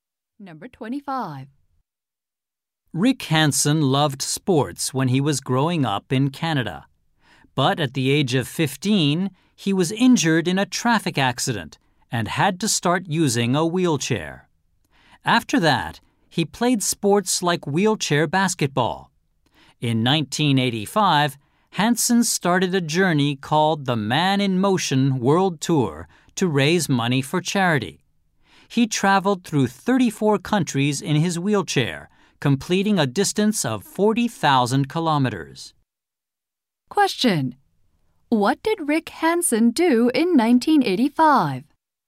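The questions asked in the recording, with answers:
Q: What did Rick Hansen do in 1985?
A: Started a wheelchair journey around the world to raise money for charity.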